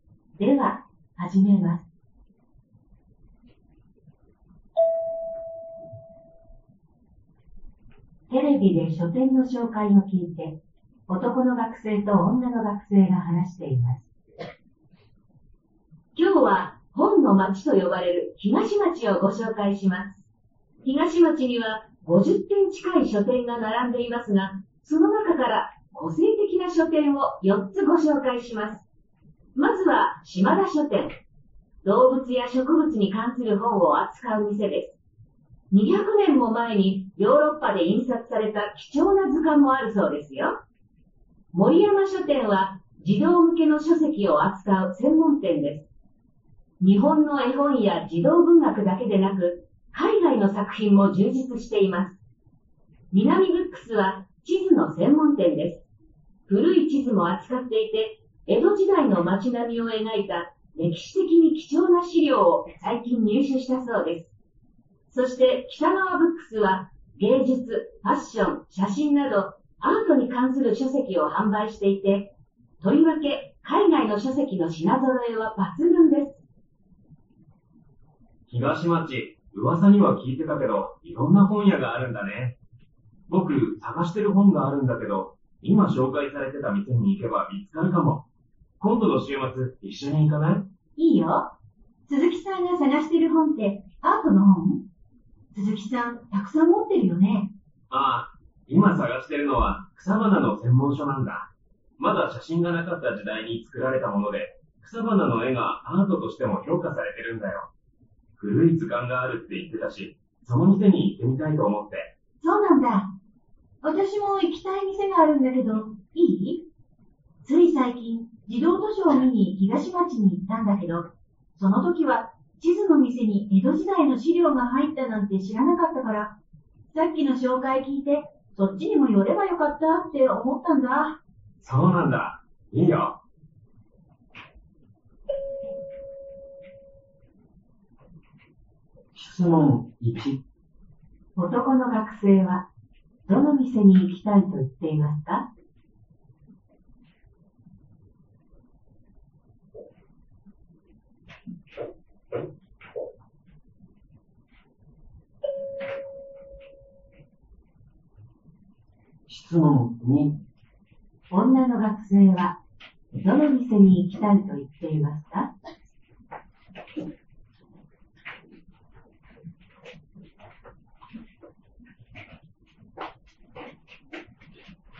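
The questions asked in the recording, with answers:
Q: 男の学生は、どの店に行きたいと言っていますか?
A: 島田書店

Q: 女の学生はどの店に行きたいと言っていますか?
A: 南ブックス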